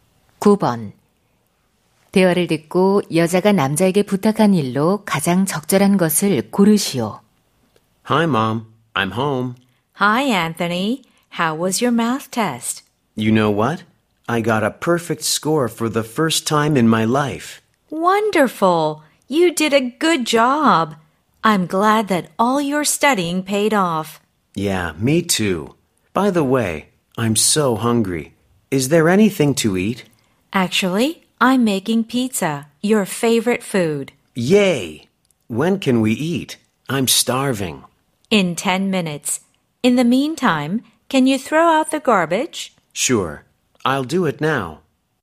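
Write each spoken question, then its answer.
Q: 대화를 듣고 여자가 남자에게 부탁한 일로 가장 적절한 것을 고르시오.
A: 쓰레기 버리기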